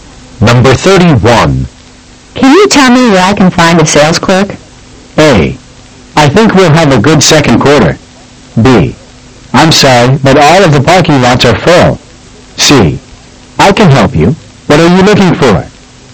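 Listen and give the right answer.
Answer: C: I can help you. What are you looking for?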